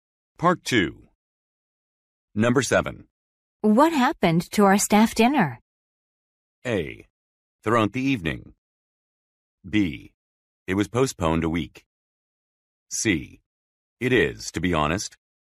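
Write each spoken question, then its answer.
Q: What happened to our staff dinner?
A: B: It was postponed a week.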